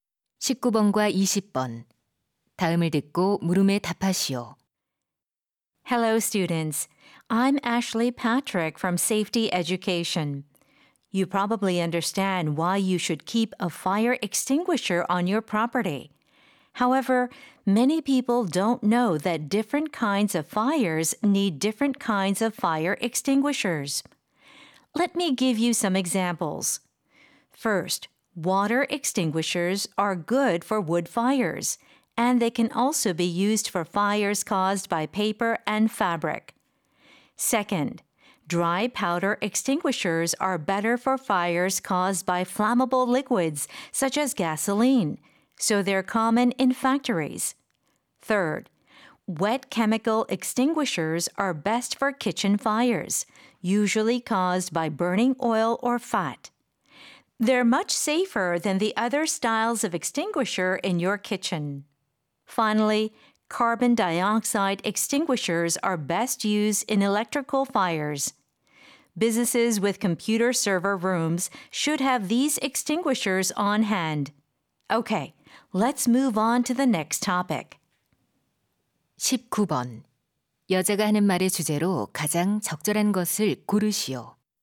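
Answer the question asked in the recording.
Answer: 화재 종류에 따라 알맞은 소화기 종류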